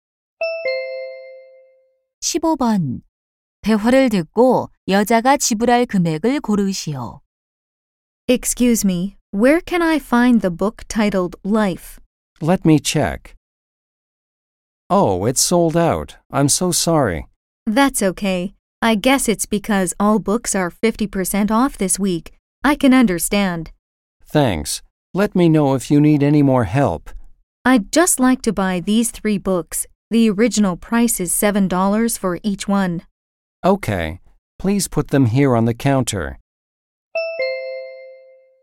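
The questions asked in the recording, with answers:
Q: 대화를 듣고 여자가 지불할 금액을 고르시오.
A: $10.50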